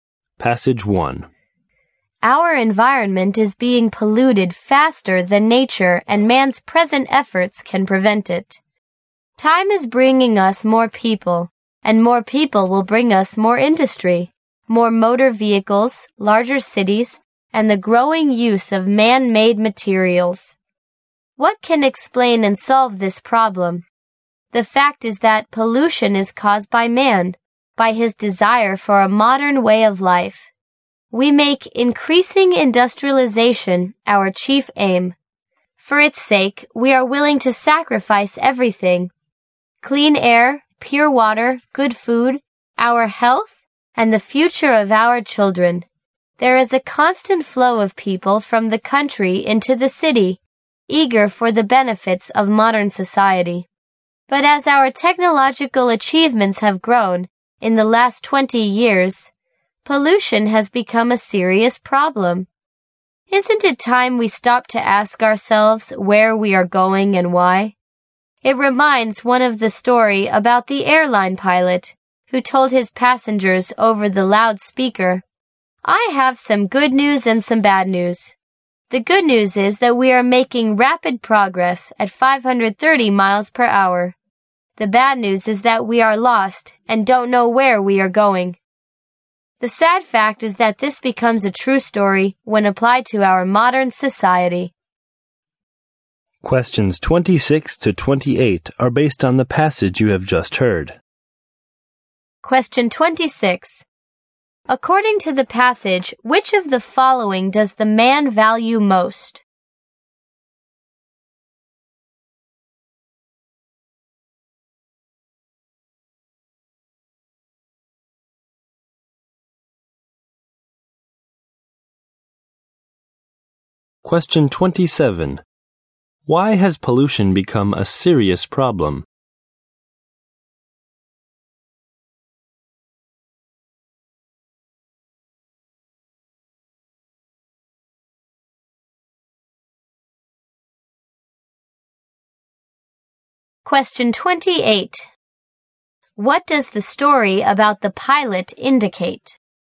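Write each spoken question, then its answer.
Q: According to the passage, which of the following does the man value most?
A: Industrialization

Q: Why has pollution become a serious problem?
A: Because of people's desire for a modern way of life and growing industrialization

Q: What does the story about the pilot indicate?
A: Modern society is progressing fast but doesn't know where it is going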